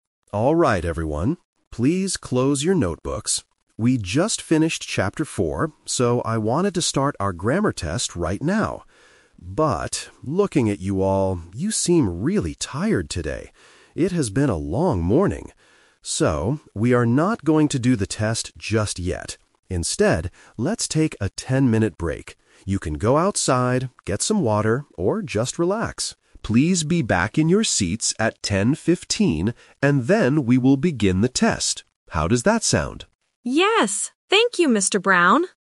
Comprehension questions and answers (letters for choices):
Listen to the teacher and choose the correct answer (A, B, or C).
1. What was the teacher's original plan for right now?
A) To take a short break.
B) To start a grammar test.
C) To teach Chapter 4.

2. Why does the teacher decide to change the plan?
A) Because the teacher needs to get some water.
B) Because the class is already over.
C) Because the students look very tired.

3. What will the students do at 10:15?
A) Begin the test.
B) Go outside and relax.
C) Open their notebooks.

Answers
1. B
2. C
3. A

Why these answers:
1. The teacher clearly says, "I wanted to start our grammar test right now." Option A is the Trap (it is the new plan, not the original plan). Option C is also a Trap because they "just finished Chapter 4", they are not going to teach it now.
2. The teacher notices the students' condition and says, "you seem really tired today." Option A is a Trap (the teacher tells the students they can "get some water", not that he needs it). Option B is not mentioned.
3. The teacher says, "Please be back in your seats at 10:15, and then we will begin the test." Option B is the Trap (going outside is what they do during the break, before 10:15). Option C is plausible but at the beginning he told them to "close" their notebooks.

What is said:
Teacher: Alright everyone, please close your notebooks. We just finished Chapter 4, so I wanted to start our grammar test right now. But... looking at you all, you seem really tired today. It has been a long morning. So, we are not going to do the test just yet. Instead, let's take a ten-minute break. You can go outside, get some water, or just relax. Please be back in your seats at 10:15, and then we will begin the test. How does that sound?